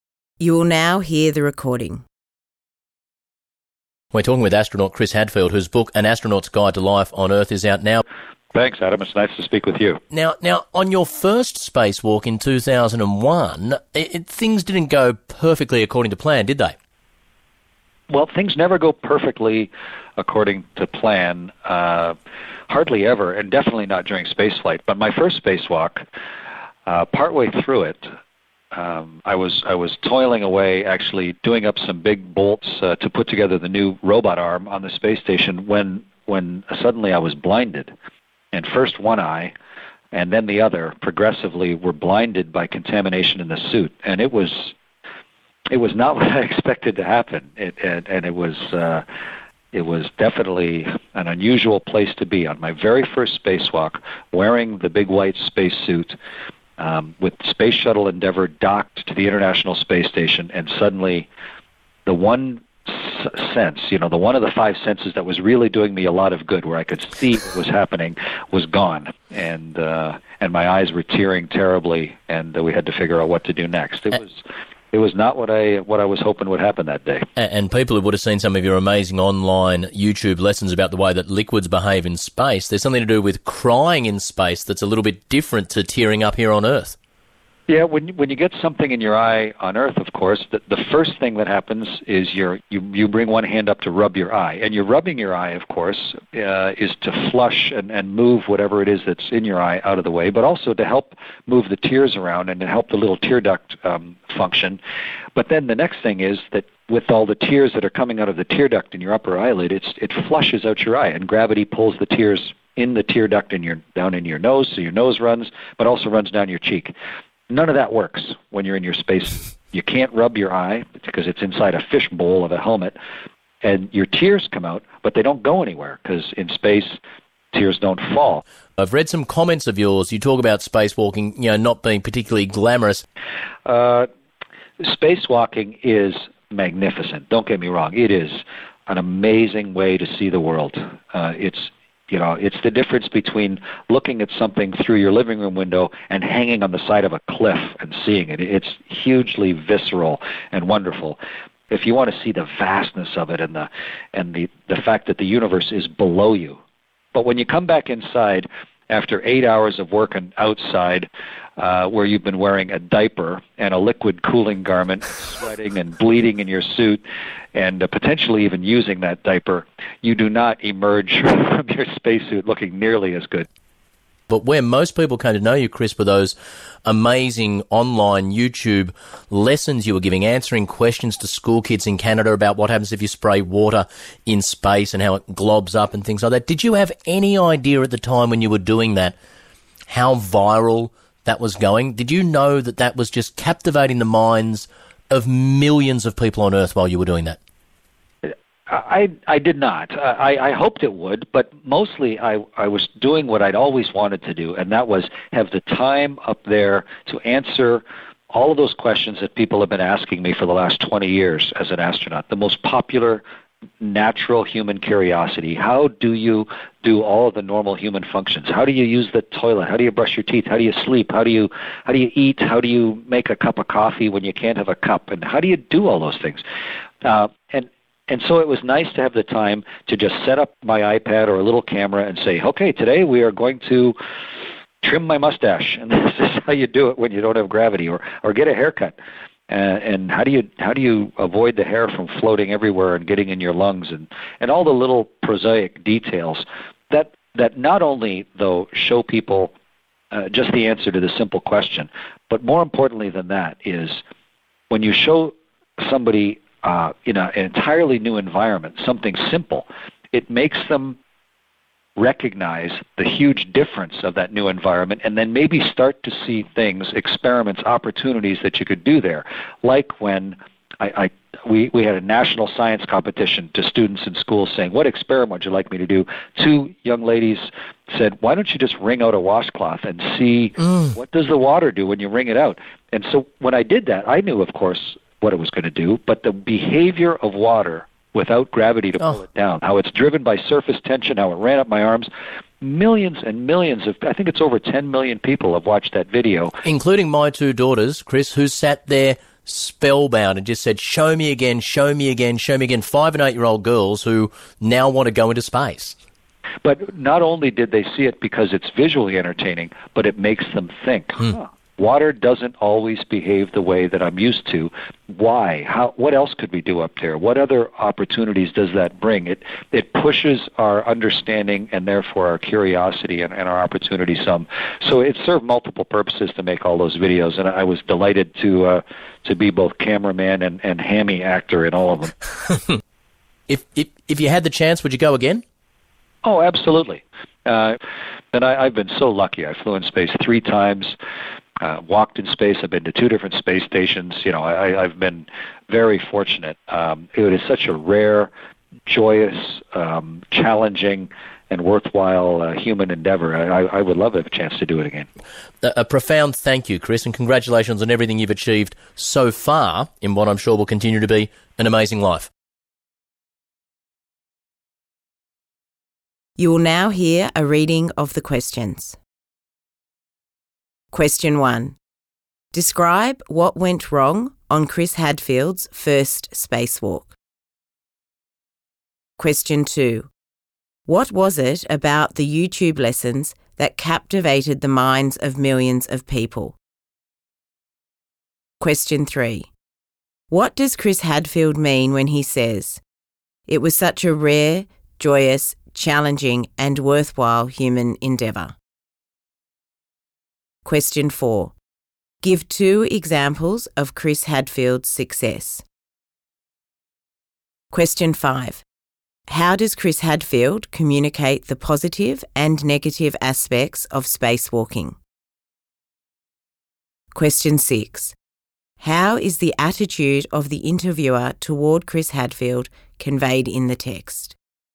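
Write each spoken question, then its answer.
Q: Describe what went wrong on Chris Hadfield's first spacewalk.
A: Contamination in his suit blinded him, first one eye and then the other; his eyes teared badly and the tears couldn't fall in space.

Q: What was it about the YouTube lessons that captivated the minds of millions of people?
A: They answered people's curiosity about how everyday human tasks are done without gravity, like using the toilet, eating or wringing out a washcloth. Seeing simple things in a new environment made people curious.

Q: Give two examples of Chris Hadfield's success.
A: He flew in space 3 times, walked in space and went to 2 different space stations. Also, over 10 million people watched his video.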